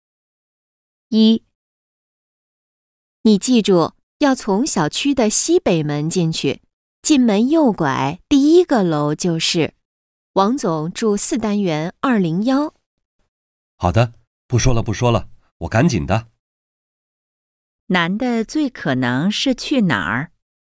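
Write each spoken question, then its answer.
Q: 男的最可能是去哪儿?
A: 王总家(小区四单元201)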